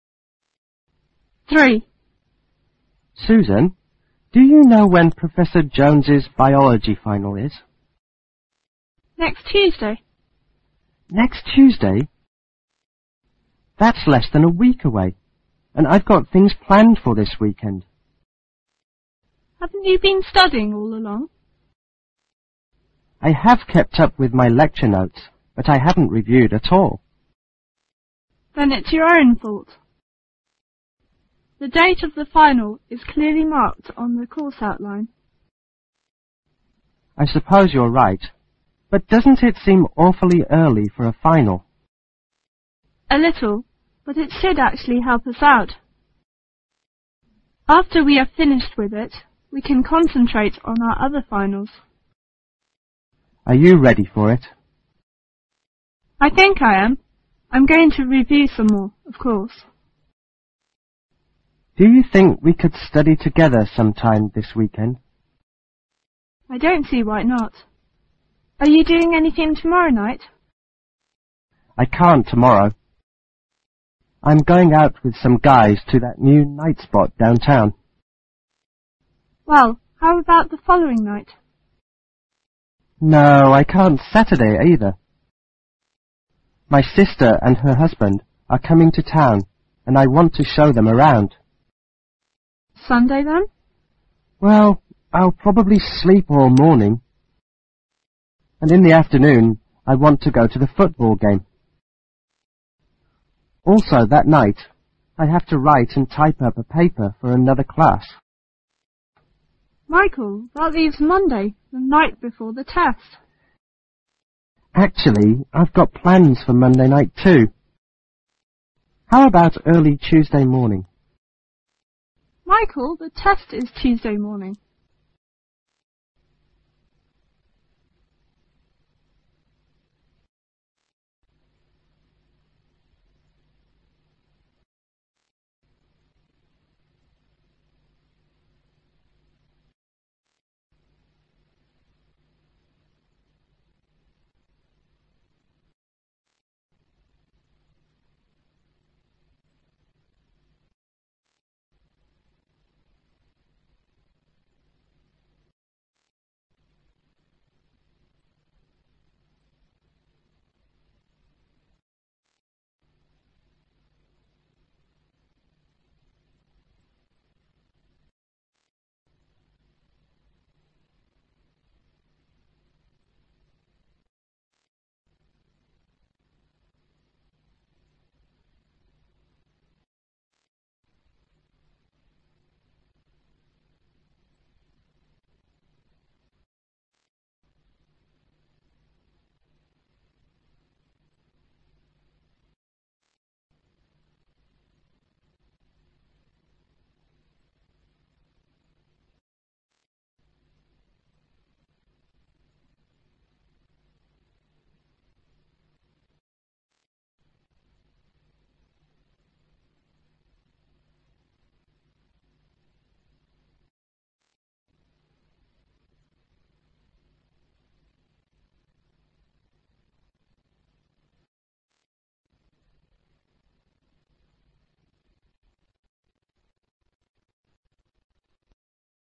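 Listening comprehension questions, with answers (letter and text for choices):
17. What day of the week is it?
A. Thursday.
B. Friday.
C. Saturday.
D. Sunday.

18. What is Michael planning to do on Sunday afternoon?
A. Go out with some friends.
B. Show his sister and brother-in-law around.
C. Sleep all afternoon.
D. Go to a football game.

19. Why does the woman think it is good that the test will be early?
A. They will have time to study for it.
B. Afternoons are bad times for tests.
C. After it,they can study for other exams.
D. They can start planning for their semester break.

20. Which of the following is probably true of the woman?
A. She has no or few plans for the weekend.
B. She'd like to go out with the man.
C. She is going to be busy all day Sunday.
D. She is worried about her performance on the final.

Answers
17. A. Thursday.
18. D. Go to a football game.
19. C. After it,they can study for other exams.
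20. A. She has no or few plans for the weekend.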